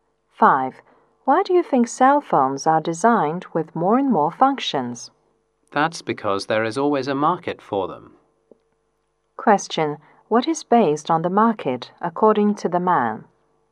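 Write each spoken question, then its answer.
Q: What is based on the market, according to the man?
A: Designing cell phones with more and more functions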